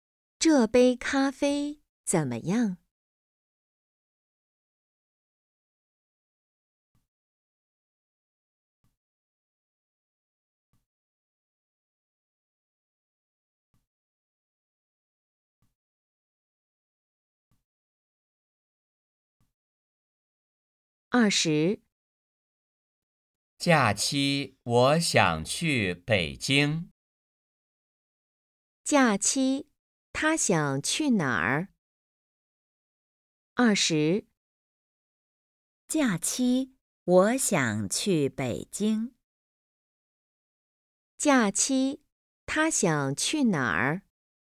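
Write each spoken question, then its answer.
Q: 假期他想去哪儿?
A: 北京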